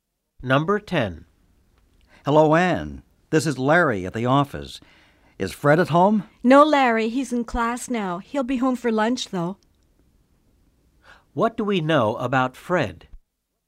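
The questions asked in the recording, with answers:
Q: What do we know about Fred?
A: He is in class now and will be home for lunch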